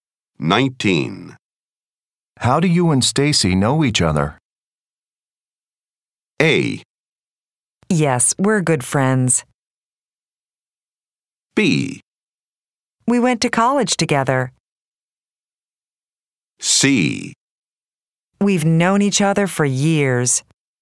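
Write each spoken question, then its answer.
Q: How do you and Stacy know each other?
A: B: We went to college together.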